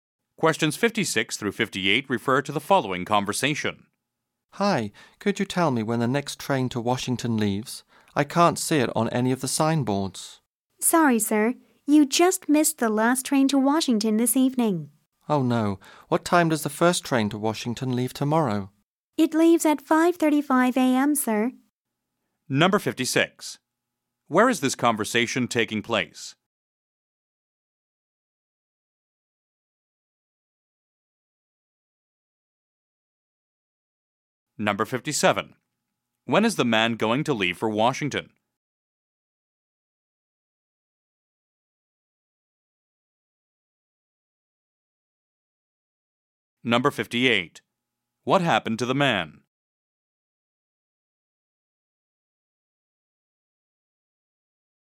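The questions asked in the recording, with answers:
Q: Where is this conversation taking place?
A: At a train station

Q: When is the man going to leave for Washington?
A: Tomorrow at 5:35 a.m.

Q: What happened to the man?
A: He missed the last train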